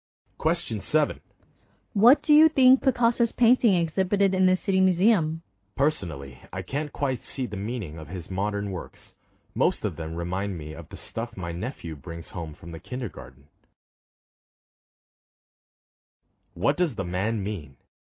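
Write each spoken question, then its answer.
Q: What does the man mean?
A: He doesn't understand or appreciate Picasso's modern works.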